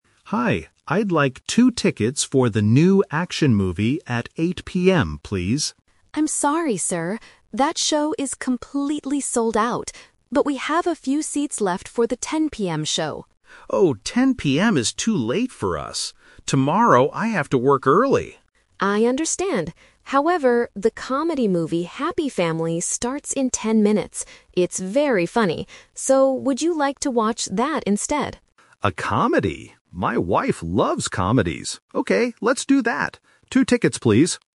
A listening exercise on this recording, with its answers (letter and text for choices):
Listen to the conversation and choose the correct answer (A, B, or C) for each question.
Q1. What time did the customer originally want to watch the movie?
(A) 8:00 PM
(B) 10:00 PM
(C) 7:00 PM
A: (A) 8:00 PM

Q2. Why doesn't the customer want to watch the later show?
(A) It is completely sold out.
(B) He has to work early tomorrow.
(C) He doesn't like action movies.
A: (B) He has to work early tomorrow.

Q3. What kind of movie will the customer watch in the end?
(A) An action movie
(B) A horror movie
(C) A comedy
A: (C) A comedy

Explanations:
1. In the beginning, the customer asks for tickets at 8:00 PM. Option B is the trap because 10:00 PM is the time the employee suggests later, but the customer rejects it. Option C is not mentioned.
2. The customer says 10:00 PM is too late because "Tomorrow I have to work early." Option A is the trap because the 8:00 PM show is sold out, not the 10:00 PM show. Option C is wrong because he originally wanted an action movie.
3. The customer originally wanted to watch an action movie (Option A is the trap). "However," the employee suggests a comedy movie, and the customer agrees ("Okay, let's do that") because his wife loves comedies. Option B is not mentioned.

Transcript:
Customer: Hi, I'd like two tickets for the new action movie at 8:00 PM, please.
Employee: I'm sorry, sir. That show is completely sold out. But we have a few seats left for the 10:00 PM show.
Customer: Oh, 10:00 PM is too late for us. Tomorrow I have to work early.
Employee: I understand. However, the comedy movie Happy Family starts in ten minutes. It's very funny. So, would you like to watch that instead?
Customer: A comedy? My wife loves comedies. Okay, let's do that. Two tickets, please.